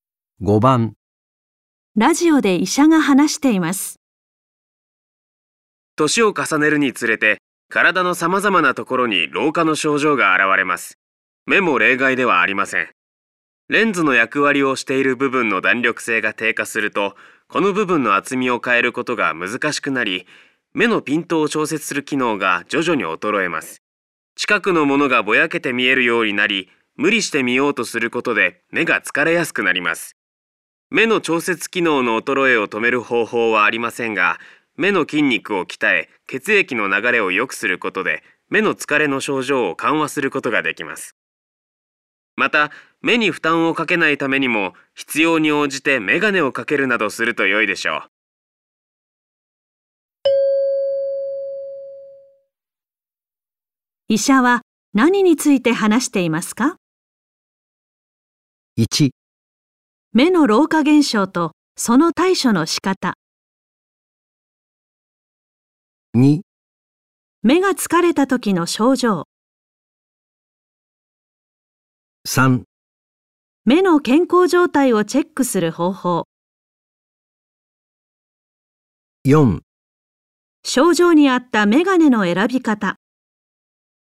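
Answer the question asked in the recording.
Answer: 1: 目の老化現象とその対処の仕方。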